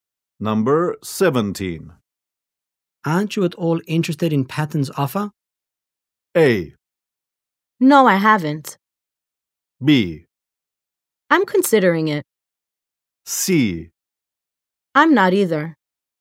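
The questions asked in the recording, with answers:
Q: Aren't you at all interested in Patton's offer?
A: B: I'm considering it.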